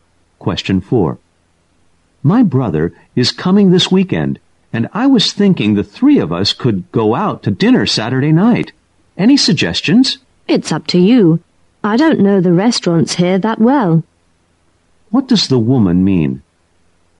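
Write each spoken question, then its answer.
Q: What does the woman mean?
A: The man should choose the restaurant because she doesn't know the local restaurants well.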